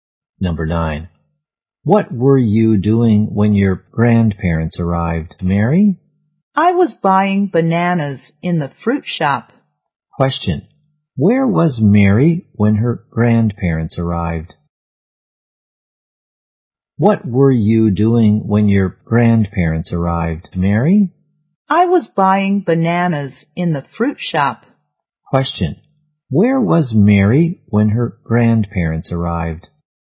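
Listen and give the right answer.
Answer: In the fruit shop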